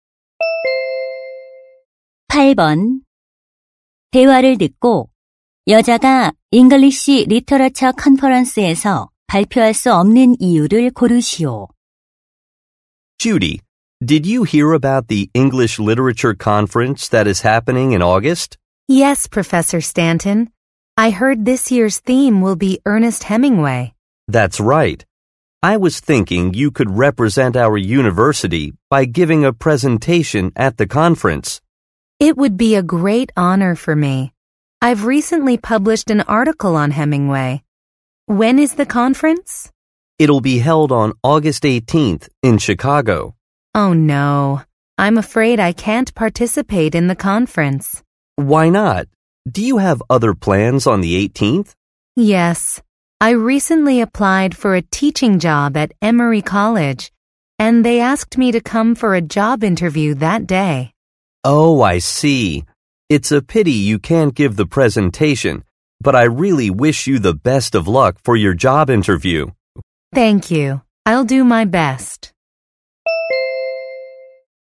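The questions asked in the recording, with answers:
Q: 대화를 듣고 여자가 English Literature Conference에서 발표할 수 없는 이유를 고르시오.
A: 같은 날 취업 면접이 있어서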